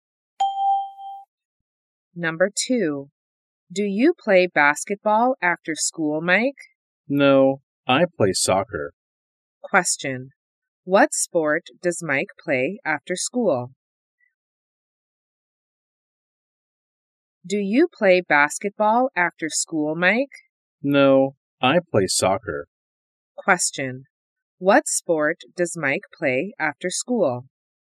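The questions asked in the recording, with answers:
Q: What sport does Mike play after school?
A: Soccer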